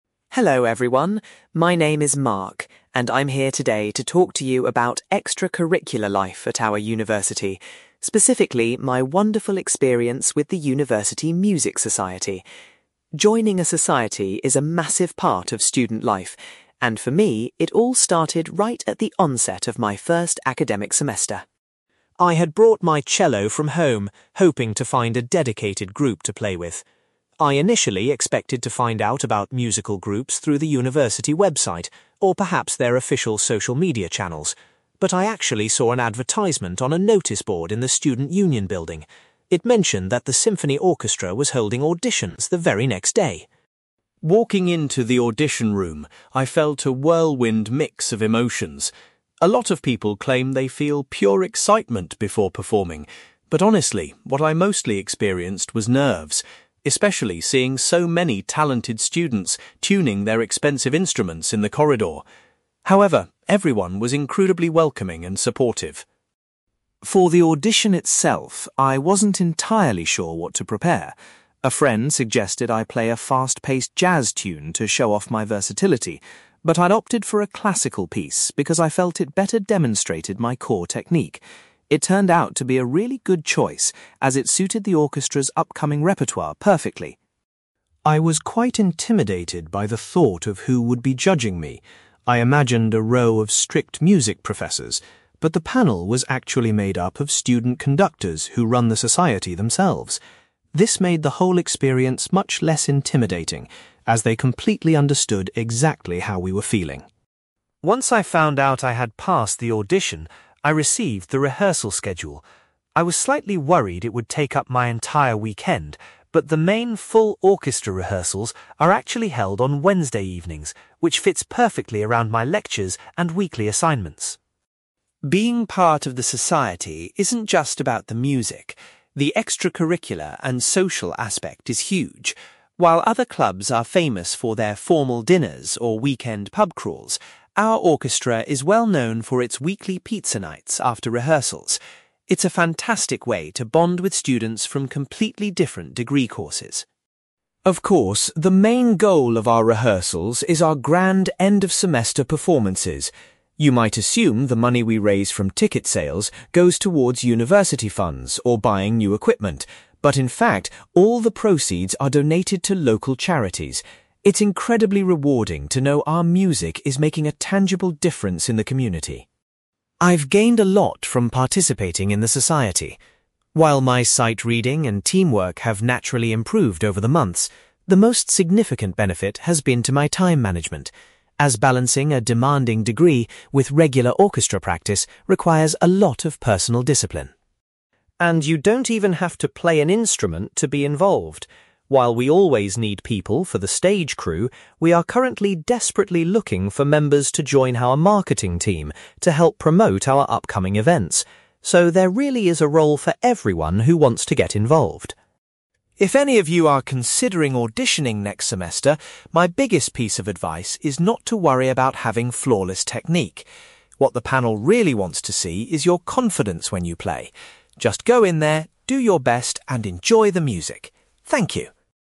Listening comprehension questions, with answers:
You will hear a student called Mark giving a presentation about his experiences with the university music society. For questions 9-18, complete the sentences with a word or short phrase.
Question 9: Mark first learned about the orchestra auditions by looking at a (9)........................... .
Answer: noticeboard

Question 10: Mark admits that he was mostly overcome by (10)........................... when he arrived for his audition.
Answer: nerves

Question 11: Mark decided to perform a (11)........................... for his audition because it highlighted his musical abilities.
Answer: classical piece

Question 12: Mark was relieved to discover that the audition judges were (12)........................... rather than university staff.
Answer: student conductors

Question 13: The orchestra's main practice sessions take place on (13)........................... .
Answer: Wednesday evenings

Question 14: Mark highlights the regular (14)........................... as a great way to socialize with other orchestra members.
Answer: pizza nights

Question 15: The profits from the orchestra's concerts are given to (15)........................... .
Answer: local charities

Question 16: Mark feels that balancing his studies and his music has greatly improved his (16)........................... .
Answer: time management

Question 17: The society is currently searching for non-musicians to help out on their (17)........................... .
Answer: marketing team

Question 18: Mark emphasizes that playing with (18)........................... is more important than having perfect technique.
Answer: confidence

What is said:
Mark: Hello everyone, my name is Mark, and I'm here today to talk to you about extracurricular life at our university, specifically my wonderful experience with the university music society. Joining a society is a massive part of student life, and for me, it all started right at the onset of my first academic semester.
I had brought my cello from home, hoping to find a dedicated group to play with. I initially expected to find out about musical groups through the university website, or perhaps their official social media channels, but I actually saw an advertisement on a noticeboard in the student union building. It mentioned that the symphony orchestra was holding auditions the very next day.
Walking into the audition room, I felt a whirlwind mix of emotions. A lot of people claim they feel pure excitement before performing, but honestly, what I mostly experienced was nerves, especially seeing so many talented students tuning their expensive instruments in the corridor. However, everyone was incredibly welcoming and supportive.
For the audition itself, I wasn't entirely sure what to prepare. A friend suggested I play a fast-paced jazz tune to show off my versatility, but I opted for a classical piece because I felt it better demonstrated my core technique. It turned out to be a really good choice, as it suited the orchestra's upcoming repertoire perfectly.
I was quite intimidated by the thought of who would be judging me. I imagined a row of strict music professors, but the panel was actually made up of student conductors who run the society themselves. This made the whole experience much less intimidating, as they completely understood exactly how we were feeling.
Once I found out I had passed the audition, I received the rehearsal schedule. I was slightly worried it would take up my entire weekend, but the main full orchestra rehearsals are actually held on Wednesday evenings, which fits perfectly around my lectures and weekly assignments.
Being part of the society isn't just about the music; the extracurricular and social aspect is huge. While other clubs are famous for their formal dinners or weekend pub crawls, our orchestra is well known for its weekly pizza nights after rehearsals. It's a fantastic way to bond with students from completely different degree courses.
Of course, the main goal of our rehearsals is our grand end-of-semester performances. You might assume the money we raise from ticket sales goes towards university funds or buying new equipment, but in fact, all the proceeds are donated to local charities. It's incredibly rewarding to know our music is making a tangible difference in the community.
I've gained a lot from participating in the society. While my sight-reading and teamwork have naturally improved over the months, the most significant benefit has been to my time management, as balancing a demanding degree with regular orchestra practice requires a lot of personal discipline.
And you don't even have to play an instrument to be involved. While we always need people for the stage crew, we are currently desperately looking for members to join our marketing team to help promote our upcoming events. So, there really is a role for everyone who wants to get involved.
If any of you are considering auditioning next semester, my biggest piece of advice is not to worry about having flawless technique. What the panel really wants to see is your confidence when you play. Just go in there, do your best, and enjoy the music. Thank you.

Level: B2